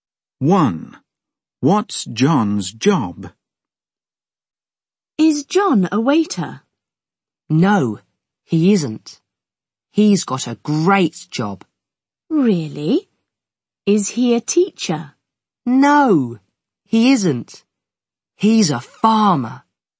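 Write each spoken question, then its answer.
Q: What's John's job?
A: He's a farmer.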